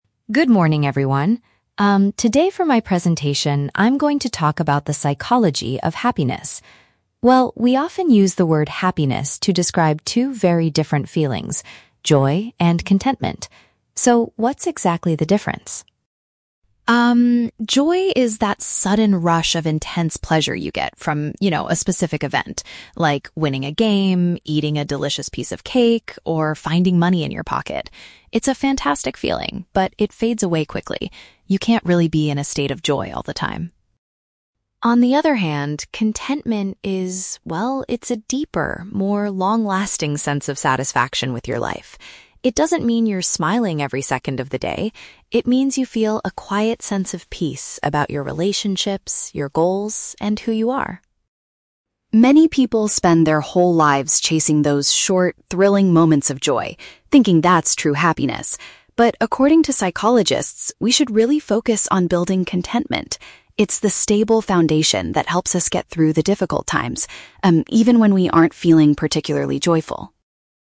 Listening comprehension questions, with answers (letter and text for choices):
Listen to a psychology student giving a presentation. Choose the correct answer (A, B, or C) for each question.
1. According to the speaker, how can "joy" be best described?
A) A permanent state of peace.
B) A brief feeling of strong happiness.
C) A psychological condition that is hard to achieve.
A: B) A brief feeling of strong happiness.

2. What does the speaker say about "contentment"?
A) It requires a person to smile all the time.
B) It mostly comes from winning games or eating good food.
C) It is a lasting feeling of being fulfilled with life.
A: C) It is a lasting feeling of being fulfilled with life.

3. What do experts suggest people should prioritize?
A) Developing a stable sense of life satisfaction.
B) Looking for short, exciting moments.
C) Avoiding difficult times completely.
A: A) Developing a stable sense of life satisfaction.

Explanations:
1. The speaker defines joy as a "sudden rush of intense pleasure" that "fades away quickly." Option (B) correctly paraphrases this. Option (A) is a trap because it describes contentment, not joy. Option (C) is not mentioned in the audio.
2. The speaker describes contentment as a "deeper, more long-lasting sense of satisfaction with your life." Option (C) uses synonyms ("lasting feeling", "fulfilled") to paraphrase this. Option (A) is a trap because the speaker explicitly says, "It doesn't mean you're smiling every second." Option (B) is a trap that describes joy, not contentment.
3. The speaker states that "according to psychologists, we should really focus on building contentment," calling it a "stable foundation." Option (A) paraphrases this idea perfectly. Option (B) is a trap because the speaker mentions people do chase short moments, but psychologists advise against making it the main focus. Option (C) is false because the audio says contentment helps us get through difficult times, not avoid them.

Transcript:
Speaker: Good morning, everyone. Um, today for my presentation, I'm going to talk about the psychology of happiness. Well, we often use the word 'happiness' to describe two very different feelings: joy and contentment. So, what's exactly the difference?
Um, joy is that sudden rush of intense pleasure you get from, you know, a specific event. Like, winning a game, eating a delicious piece of cake, or finding money in your pocket. It's a fantastic feeling, but it fades away quickly. You can't really be in a state of joy all the time.
On the other hand, contentment is... well, it's a deeper, more long-lasting sense of satisfaction with your life. It doesn't mean you're smiling every second of the day. It means you feel a quiet sense of peace about your relationships, your goals, and who you are.
Many people spend their whole lives chasing those short, thrilling moments of joy, thinking that's true happiness. But, according to psychologists, we should really focus on building contentment. It's the stable foundation that helps us get through the difficult times, um, even when we aren't feeling particularly joyful.